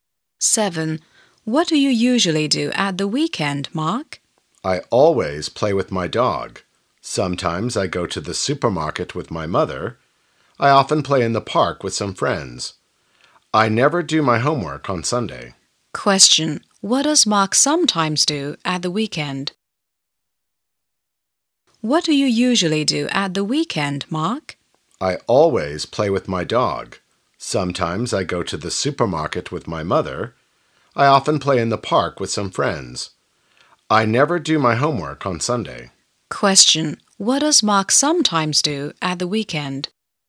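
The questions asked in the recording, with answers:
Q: What does Mark sometimes do at the weekend?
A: He goes to the supermarket with his mother.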